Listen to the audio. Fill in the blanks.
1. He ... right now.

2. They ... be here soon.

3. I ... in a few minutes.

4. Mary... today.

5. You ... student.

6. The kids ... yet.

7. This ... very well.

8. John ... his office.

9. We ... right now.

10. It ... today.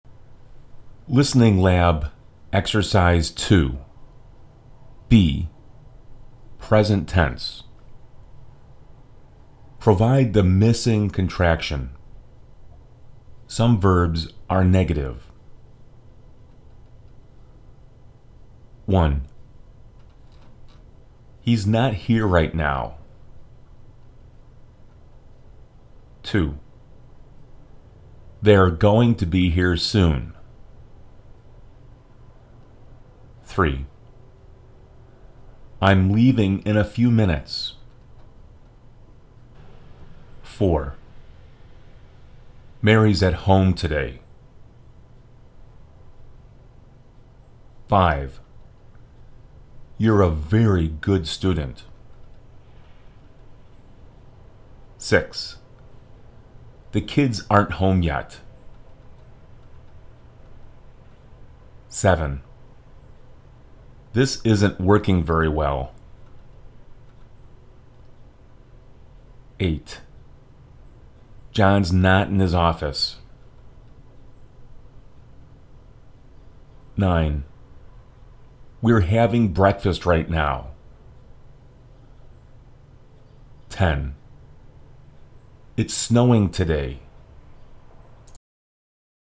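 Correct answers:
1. 's not here
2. 're going to
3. 'm leaving
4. 's at home
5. 're a very good
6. aren't home
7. isn't working
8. 's not in
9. 're having breakfast
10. 's snowing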